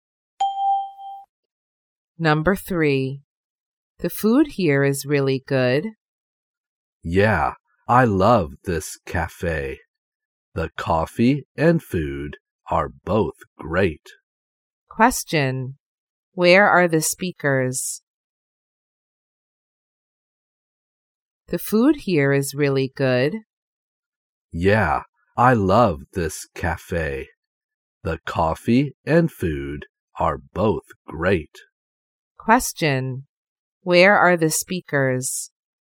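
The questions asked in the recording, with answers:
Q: Where are the speakers?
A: In a cafe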